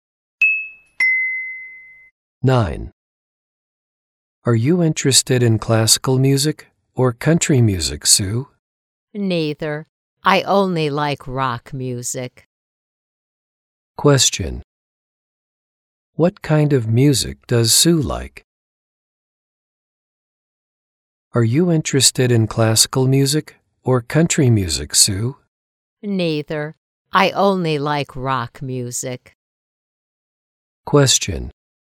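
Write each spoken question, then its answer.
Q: What kind of music does Sue like?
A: Rock music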